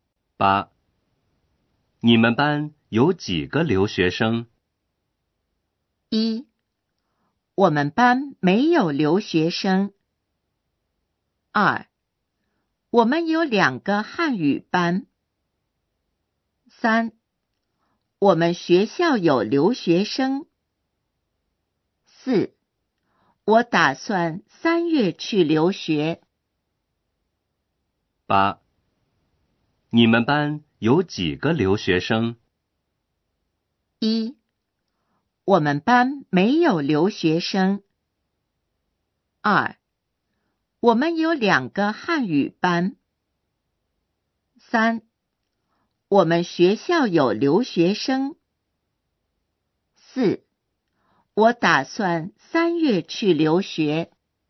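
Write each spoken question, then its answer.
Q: 你们班有几个留学生?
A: 1: 我们班没有留学生。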